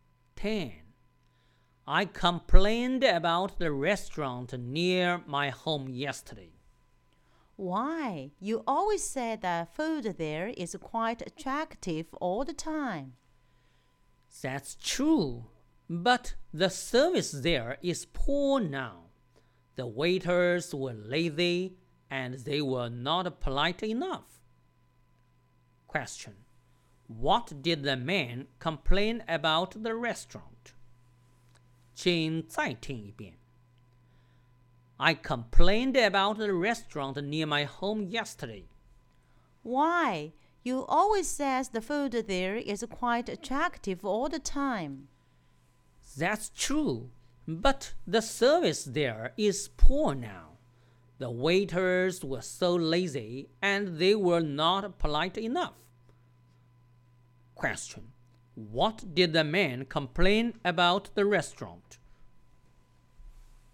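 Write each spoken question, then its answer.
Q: what did the man complain about the restaurant?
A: The poor service (the waiters were lazy and impolite)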